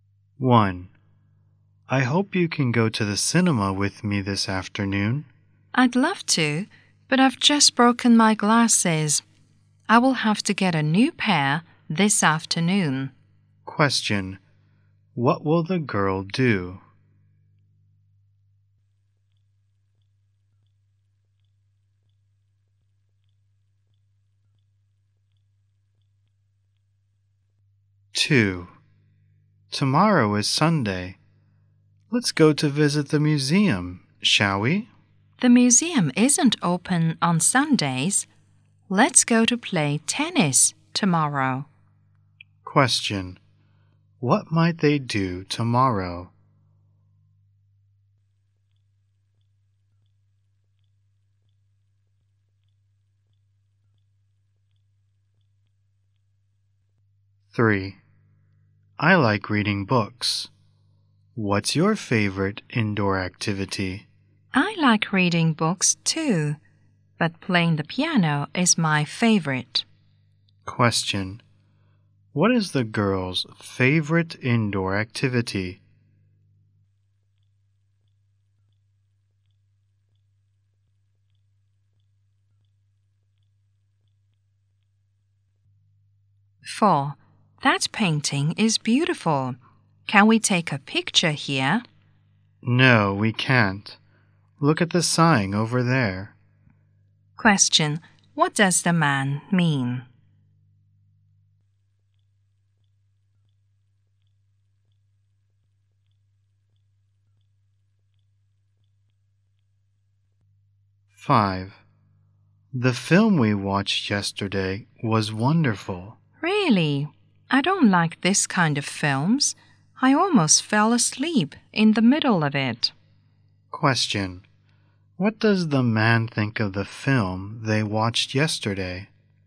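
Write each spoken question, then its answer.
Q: What will the girl do?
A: Get a new pair of glasses

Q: What might they do tomorrow?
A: Play tennis

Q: What is the girl's favorite indoor activity?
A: Playing the piano

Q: What does the man mean?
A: They can't take pictures here

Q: What does the man think of the film they watched yesterday?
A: He didn't like it; it was boring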